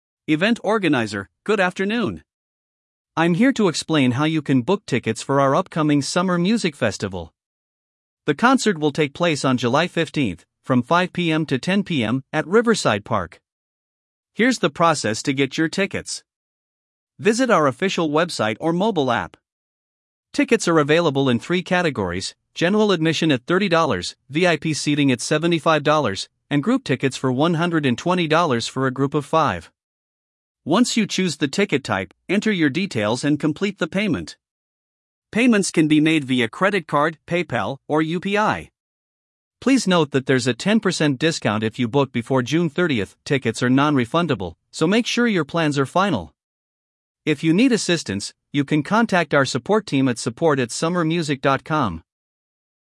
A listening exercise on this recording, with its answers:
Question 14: When will the Summer Music Festival take place?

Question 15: What is the duration of the concert?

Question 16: How much does a General Admission ticket cost?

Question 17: What is the cost of a group ticket?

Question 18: What payment methods are accepted?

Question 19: What discount is available, and what is the deadline?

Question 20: What email address can customers use for support?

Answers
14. July 15th
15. 5 PM to 10 PM
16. $30
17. $120
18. Credit card, PayPal, UPI
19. 10%, June 30th
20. support@summermusic.com

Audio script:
Event Organizer: Good afternoon! I'm here to explain how you can book tickets for our upcoming Summer Music Festival. The concert will take place on July 15th, from 5 PM to 10 PM, at Riverside Park.
Here's the process to get your tickets:
Visit our official website or mobile app.
Tickets are available in three categories: General Admission at $30, VIP Seating at $75, and Group Tickets for $120 for a group of 5.
Once you choose the ticket type, enter your details and complete the payment. Payments can be made via credit card, PayPal, or UPI.
Please note that there's a 10% discount if you book before June 30th. Tickets are non-refundable, so make sure your plans are final. If you need assistance, you can contact our support team at support@summermusic.com.